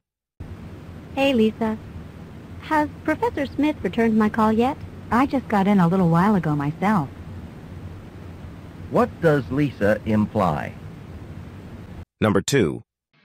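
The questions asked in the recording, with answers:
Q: What does Lisa imply?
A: She doesn't know if Professor Smith has called back.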